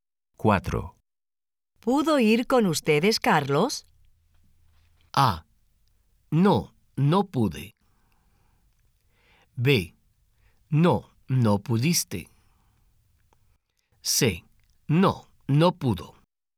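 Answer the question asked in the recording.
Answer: C: No, no pudo.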